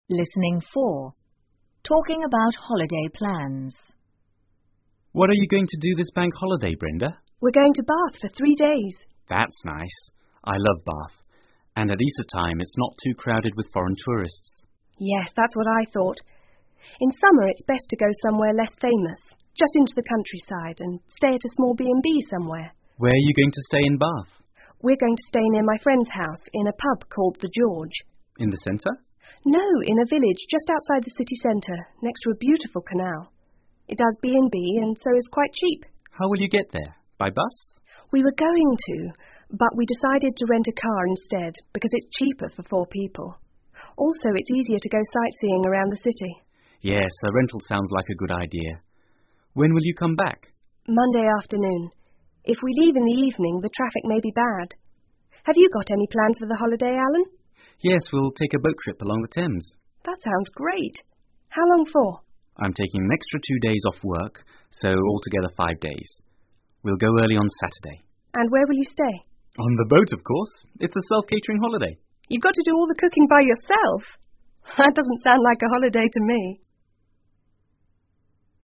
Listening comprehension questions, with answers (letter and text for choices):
请根据对话内容,选出一个正确的答案.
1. Where is the woman going to stay?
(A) At a friend' s house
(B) At a pub called The George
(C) At a pub called Bath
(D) At a rental home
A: (B) At a pub called The George

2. The woman is renting a car_________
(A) with four other people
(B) with three other people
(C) with two other people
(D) alone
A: (B) with three other people

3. How many days is the man going away for?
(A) Two days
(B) Three days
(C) Four days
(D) Five days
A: (D) Five days

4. What will the man do for food?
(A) Go to the pub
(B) Cook his own meals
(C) Eat at a hotel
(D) Eat at restaurants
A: (B) Cook his own meals

请根据对话内容,判断下面句子是否正确,如果符合对话内容,请在T做记号,如果不符合,请在F做记号。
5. Easter time is more crowded than summer.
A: F

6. The woman is staying at a friend's house.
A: F

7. The woman is going by bus.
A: F

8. The man will stay on a boat.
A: T

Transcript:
Alan:What are you going to do this bank holiday,Brenda?
Brenda:We're going to Bath for three days.
A:That's nice.I love Bath,and at Easter time,it's not too crowded with foreign tourists.
B:Yes,that's what I thought.In summer,it's best to go somewhere less famous,just into the countryside and stay at a small B&B somewhere.
A:Where are you going to stay in Bath?
B:We're going to stay near my friend's house in a pub called The George.
A:In the centre?
B:No,in a village just outside the city centre next to a beautiful canal.It does B&B and so it is quite cheap.
A:How will you get there?By bus?
B:We were going to,but we decided to rent a car instead because it's cheaper for four people.Also,it's easier to go sightseeing around the city.
A:Yes,a rental sounds like a good idea.When will you come back?
B:Monday afternoon.If we leave in the evening,the traffic may be bad.Have you got any plans for the holiday,Alan?
A:Yes,we'll take a boat trip along the Thames.
B:That sounds great.How long for?
A:I'm taking extra two days off work,so altogether five days.We'll go early on Saturday.
B:And where will you stay?
A:On the boat,of course.It's a self-catering holiday.
B:You've got to do all the cooking by yourself?That doesn't sound like a holiday to me!